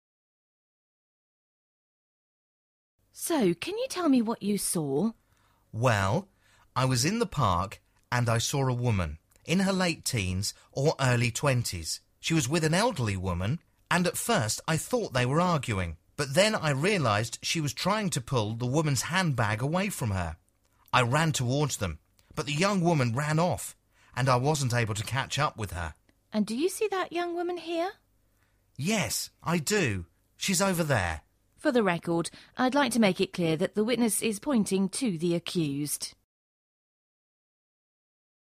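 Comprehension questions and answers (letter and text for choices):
Where is this conversation taking place?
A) in a university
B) in a courtroom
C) in a police station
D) in a park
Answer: B) in a courtroom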